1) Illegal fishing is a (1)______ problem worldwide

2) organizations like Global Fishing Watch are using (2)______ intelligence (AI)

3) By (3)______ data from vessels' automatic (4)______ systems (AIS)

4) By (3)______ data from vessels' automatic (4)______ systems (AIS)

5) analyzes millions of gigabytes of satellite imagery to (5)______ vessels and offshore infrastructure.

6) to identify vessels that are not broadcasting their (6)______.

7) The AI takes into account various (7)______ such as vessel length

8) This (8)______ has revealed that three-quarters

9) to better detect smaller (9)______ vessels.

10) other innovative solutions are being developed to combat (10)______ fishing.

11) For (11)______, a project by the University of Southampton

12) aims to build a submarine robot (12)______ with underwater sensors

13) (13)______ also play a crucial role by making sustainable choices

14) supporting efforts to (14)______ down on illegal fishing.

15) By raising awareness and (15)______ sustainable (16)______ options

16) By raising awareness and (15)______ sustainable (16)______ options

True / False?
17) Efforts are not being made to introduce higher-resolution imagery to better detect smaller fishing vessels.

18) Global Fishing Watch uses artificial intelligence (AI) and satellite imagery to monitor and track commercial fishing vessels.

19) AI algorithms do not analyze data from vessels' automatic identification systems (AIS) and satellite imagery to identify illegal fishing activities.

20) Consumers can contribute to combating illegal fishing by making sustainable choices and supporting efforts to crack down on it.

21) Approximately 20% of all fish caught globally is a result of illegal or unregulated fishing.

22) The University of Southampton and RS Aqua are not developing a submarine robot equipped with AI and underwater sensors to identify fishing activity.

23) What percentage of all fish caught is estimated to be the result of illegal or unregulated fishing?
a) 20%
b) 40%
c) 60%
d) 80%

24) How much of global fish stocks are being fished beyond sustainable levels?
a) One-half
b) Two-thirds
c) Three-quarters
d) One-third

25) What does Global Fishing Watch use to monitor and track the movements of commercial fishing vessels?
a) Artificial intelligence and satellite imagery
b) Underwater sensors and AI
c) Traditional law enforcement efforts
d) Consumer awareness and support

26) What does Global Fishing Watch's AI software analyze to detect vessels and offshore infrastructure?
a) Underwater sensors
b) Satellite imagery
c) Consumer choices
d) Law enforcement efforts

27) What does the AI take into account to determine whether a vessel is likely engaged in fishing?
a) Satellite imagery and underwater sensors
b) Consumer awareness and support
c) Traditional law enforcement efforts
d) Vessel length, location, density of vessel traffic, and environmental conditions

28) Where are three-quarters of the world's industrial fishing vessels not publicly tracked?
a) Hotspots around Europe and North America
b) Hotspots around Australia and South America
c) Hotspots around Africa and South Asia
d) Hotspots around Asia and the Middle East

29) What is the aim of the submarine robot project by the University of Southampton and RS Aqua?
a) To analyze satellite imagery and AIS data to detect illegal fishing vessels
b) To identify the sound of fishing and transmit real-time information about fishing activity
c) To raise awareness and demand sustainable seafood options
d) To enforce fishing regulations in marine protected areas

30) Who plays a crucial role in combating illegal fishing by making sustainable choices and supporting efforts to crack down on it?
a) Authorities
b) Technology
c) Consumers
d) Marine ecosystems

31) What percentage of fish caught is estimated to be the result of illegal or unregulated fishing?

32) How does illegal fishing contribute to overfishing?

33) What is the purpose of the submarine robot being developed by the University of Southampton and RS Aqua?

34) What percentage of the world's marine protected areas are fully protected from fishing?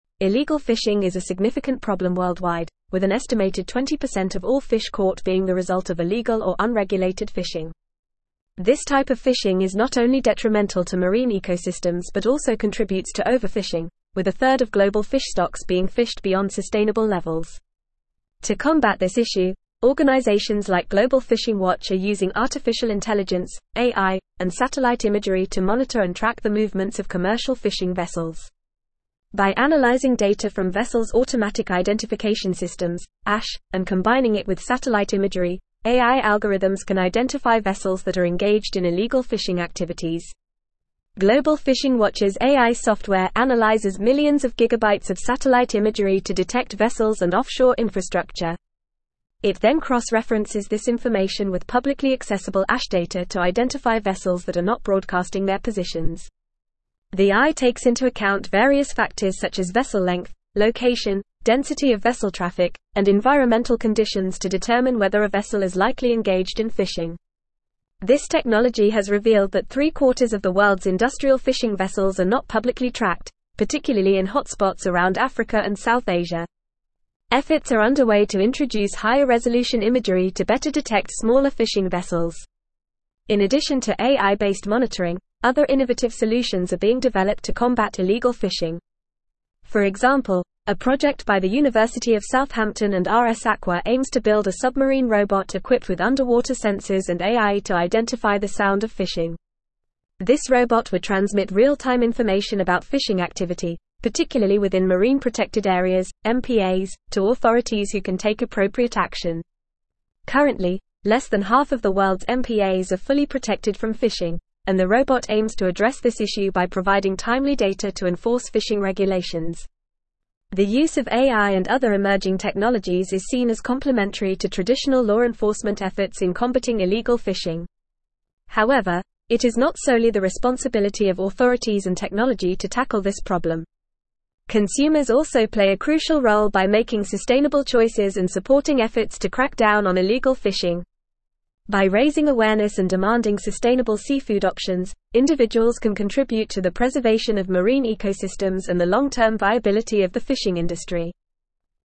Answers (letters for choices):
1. significant
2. artificial
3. analyzing
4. identification
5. detect
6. positions
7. factors
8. technology
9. fishing
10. illegal
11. example
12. equipped
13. Consumers
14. crack
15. demanding
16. seafood
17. False
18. True
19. False
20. True
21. True
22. False
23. a
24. d
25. a
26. b
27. d
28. c
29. b
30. c
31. 20%
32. by exceeding sustainable fishing levels
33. to identify the sound of fishing
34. less than half

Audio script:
Illegal fishing is a significant problem worldwide, with an estimated 20% of all fish caught being the result of illegal or unregulated fishing. This type of fishing is not only detrimental to marine ecosystems but also contributes to overfishing, with a third of global fish stocks being fished beyond sustainable levels. To combat this issue, organizations like Global Fishing Watch are using artificial intelligence (AI) and satellite imagery to monitor and track the movements of commercial fishing vessels. By analyzing data from vessels' automatic identification systems (AIS) and combining it with satellite imagery, AI algorithms can identify vessels that are engaged in illegal fishing activities.
Global Fishing Watch's AI software analyzes millions of gigabytes of satellite imagery to detect vessels and offshore infrastructure. It then cross-references this information with publicly accessible AIS data to identify vessels that are not broadcasting their positions. The AI takes into account various factors such as vessel length, location, density of vessel traffic, and environmental conditions to determine whether a vessel is likely engaged in fishing. This technology has revealed that three-quarters of the world's industrial fishing vessels are not publicly tracked, particularly in hotspots around Africa and South Asia. Efforts are underway to introduce higher-resolution imagery to better detect smaller fishing vessels.
In addition to AI-based monitoring, other innovative solutions are being developed to combat illegal fishing. For example, a project by the University of Southampton and RS Aqua aims to build a submarine robot equipped with underwater sensors and AI to identify the sound of fishing. This robot would transmit real-time information about fishing activity, particularly within marine protected areas (MPAs), to authorities who can take appropriate action. Currently, less than half of the world's MPAs are fully protected from fishing, and the robot aims to address this issue by providing timely data to enforce fishing regulations.
The use of AI and other emerging technologies is seen as complementary to traditional law enforcement efforts in combating illegal fishing. However, it is not solely the responsibility of authorities and technology to tackle this problem. Consumers also play a crucial role by making sustainable choices and supporting efforts to crack down on illegal fishing. By raising awareness and demanding sustainable seafood options, individuals can contribute to the preservation of marine ecosystems and the long-term viability of the fishing industry.

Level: Level 4